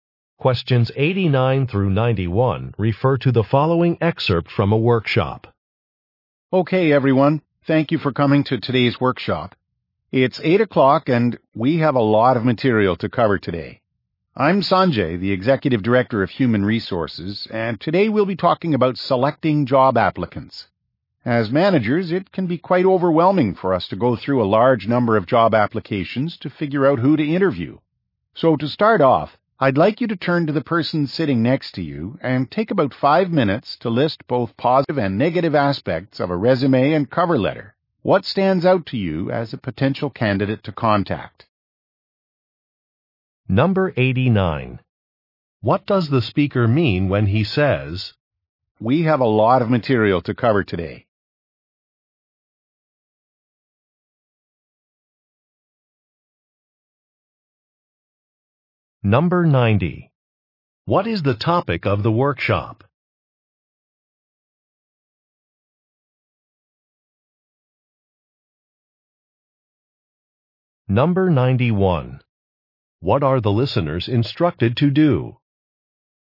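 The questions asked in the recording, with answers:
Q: What is the topic of the workshop?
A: Selecting job applicants

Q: What are the listeners instructed to do?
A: Work with a partner to list positive and negative aspects of resumes and cover letters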